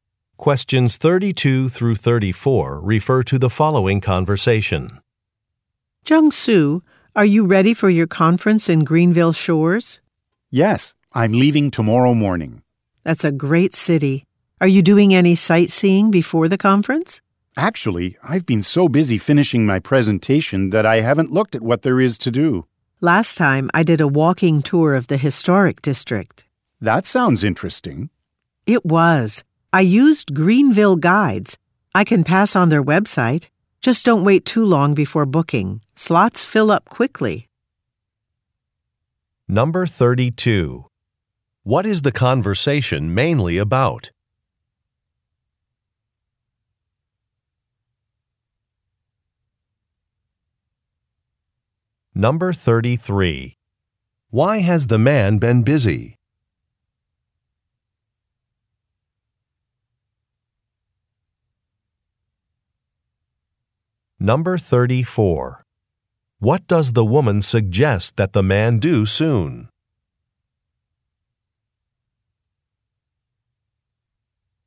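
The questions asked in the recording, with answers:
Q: What is the conversation mainly about?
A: Sightseeing plans in Greenville Shores before a conference

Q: Why has the man been busy?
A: He has been finishing his presentation

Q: What does the woman suggest that the man do soon?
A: Book a walking tour with Greenville Guides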